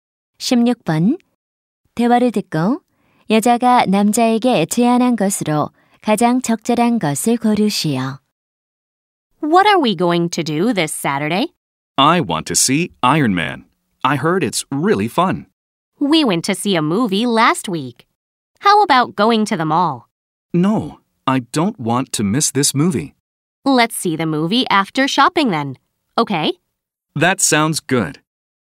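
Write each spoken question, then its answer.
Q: 대화를 듣고 여자가 남자에게 제안한 것으로 가장 적절한 것을 고르시오.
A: 쇼핑몰에 가기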